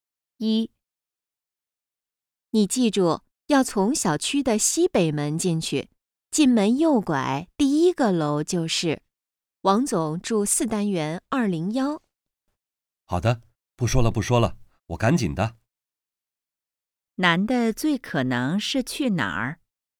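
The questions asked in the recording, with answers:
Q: 男的最可能是去哪儿?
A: 王总家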